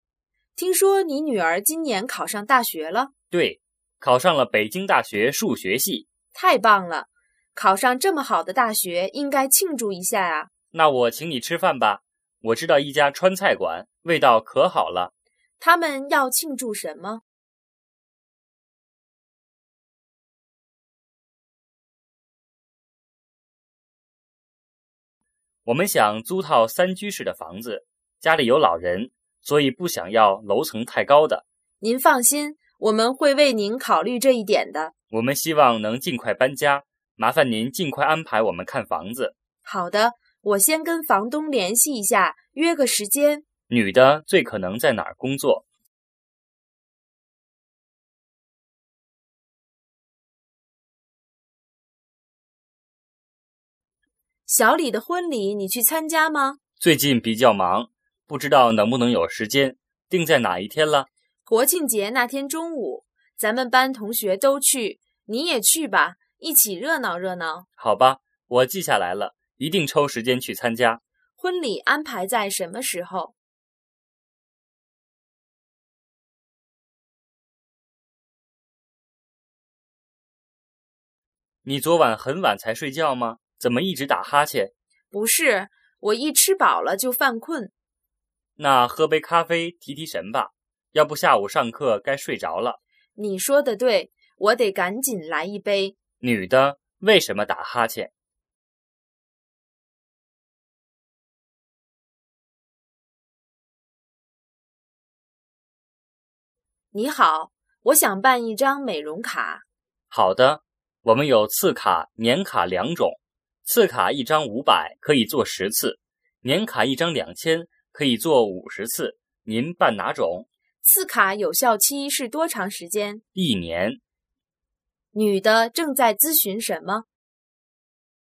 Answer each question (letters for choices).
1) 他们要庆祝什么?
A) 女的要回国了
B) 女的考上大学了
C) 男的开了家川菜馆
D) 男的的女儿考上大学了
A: D

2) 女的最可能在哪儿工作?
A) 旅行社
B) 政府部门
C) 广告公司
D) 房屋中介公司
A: D

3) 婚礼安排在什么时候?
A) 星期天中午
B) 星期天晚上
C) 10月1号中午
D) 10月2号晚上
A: C

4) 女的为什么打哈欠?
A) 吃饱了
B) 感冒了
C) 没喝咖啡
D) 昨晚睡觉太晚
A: A

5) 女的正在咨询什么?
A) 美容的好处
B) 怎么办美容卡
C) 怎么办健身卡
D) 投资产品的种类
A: B

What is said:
女:听说你女儿今年考上大学了?
男:对,考上了北京大学数学系。
女:太棒了!考上这么好的大学,应该庆祝一下啊。
男:那我请你吃饭吧,我知道一家川菜馆,味道可好了。
问:他们要庆祝什么?
男:我们想租套三居室的房子,家里有老人,所以不想要楼层太高的。
女:您放心,我们会为您考虑这一点的。
男:我们希望能尽快搬家,麻烦您尽快安排我们看房子。
女:好的,我先跟房东联系一下,约个时间。
问:女的最可能在哪儿工作?
女:小李的婚礼你去参加吗?
男:最近比较忙,不知道能不能有时间,定在哪一天了?
女:国庆节那天中午。咱们班同学都去,你也去吧,一起热闹热闹。
男:好吧,我记下来了,一定抽时间去参加。
问:婚礼安排在什么时候?
男:你昨晚很晚才睡觉吗?怎么一直打哈欠?
女:不是,我一吃饱了就犯困。
男:那喝杯咖啡提提神吧,要不下午上课该睡着了。
女:你说的对,我得赶紧来一杯。
问:女的为什么打哈欠?
女:你好,我想办一张美容卡。
男:好的。我们有次卡、年卡两种,次卡一张五百,可以做十次;年卡一张两千,可以做五十次,您办哪种?
女:次卡有效期是多长时间?
男:一年。
问:女的正在咨询什么?

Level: 汉语水平考试(HSK)五级